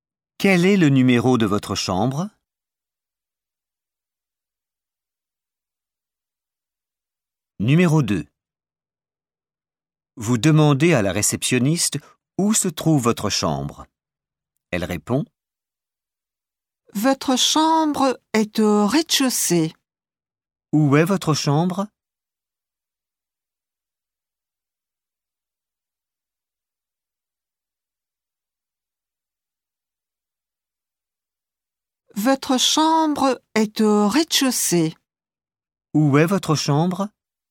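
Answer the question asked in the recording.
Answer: au rez-de-chaussée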